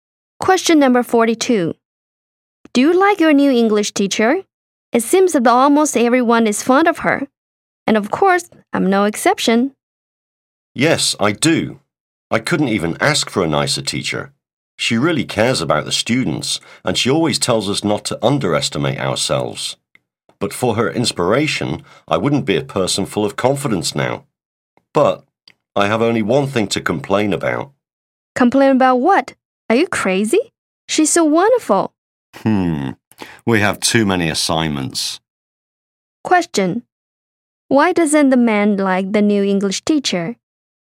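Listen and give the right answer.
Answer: She gives too many assignments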